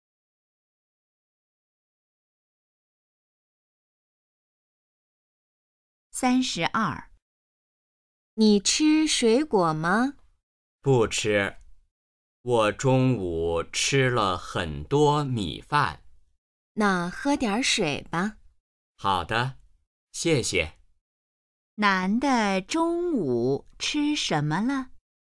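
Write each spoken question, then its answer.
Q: 男的中午吃什么了?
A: 米饭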